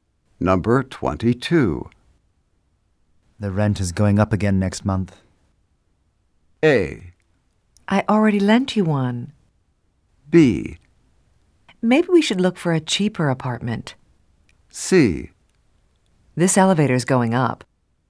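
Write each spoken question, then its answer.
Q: The rent is going up again next month.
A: B: Maybe we should look for a cheaper apartment.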